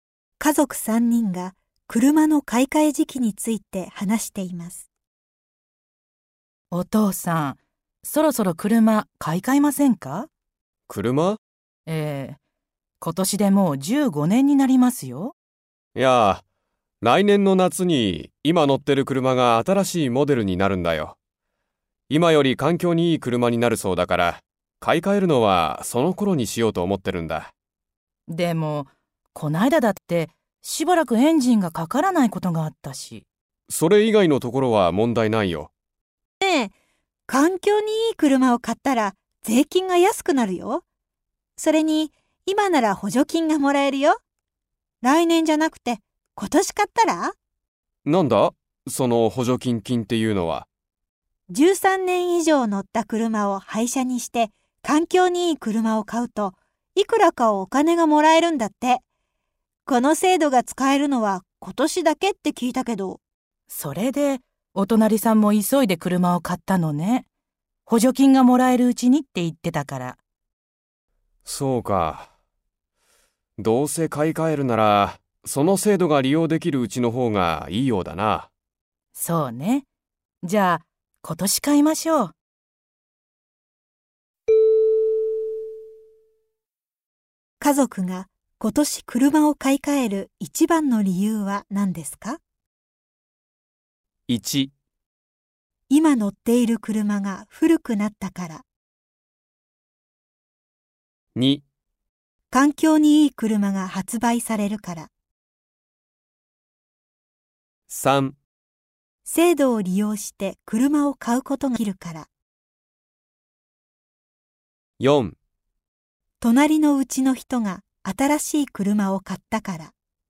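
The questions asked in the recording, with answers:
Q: 今年車を買い替える一番の理由は何ですか?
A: 3: 制度を利用して車を買うことができるから。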